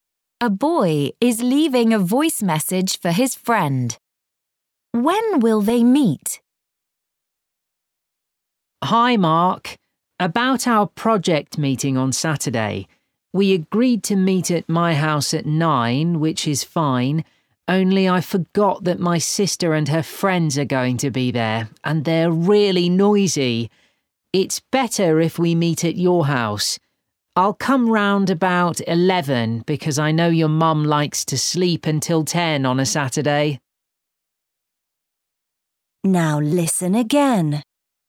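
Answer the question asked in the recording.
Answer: At about 11 on Saturday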